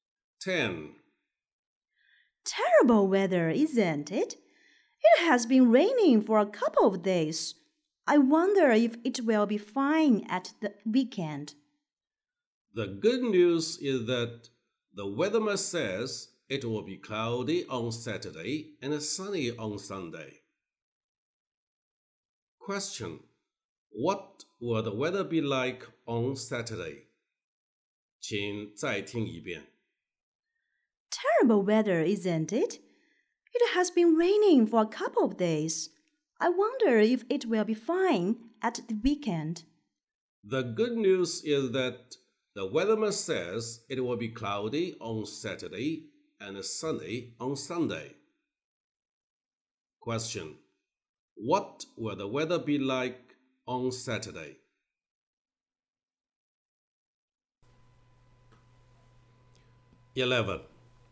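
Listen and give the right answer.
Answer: Cloudy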